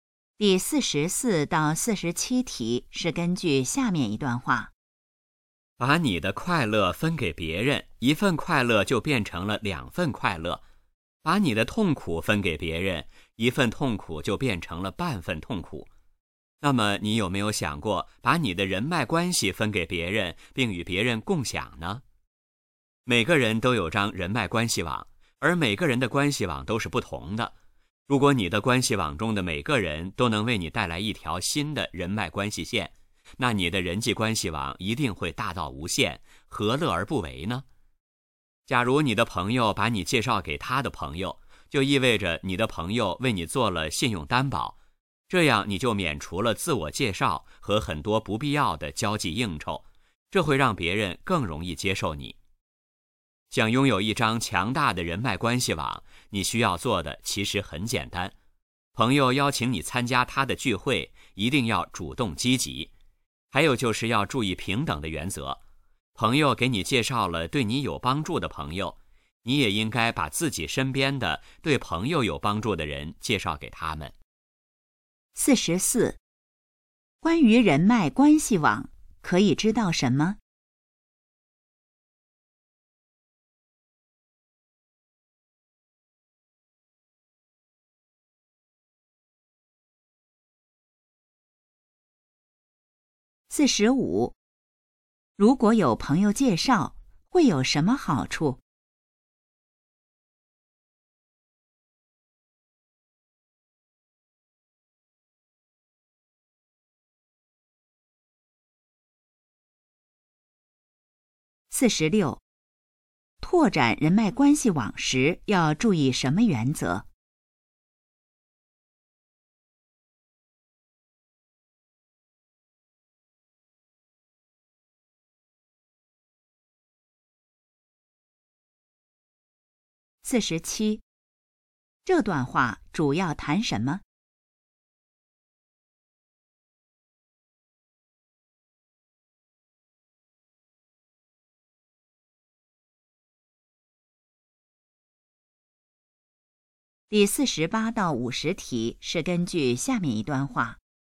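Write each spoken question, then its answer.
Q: 如果有朋友介绍,会有什么好处?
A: 别人更容易接受你

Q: 拓展人脉关系网时,要注意什么原则?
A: 平等

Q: 这段话主要谈什么?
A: 与别人共享人脉关系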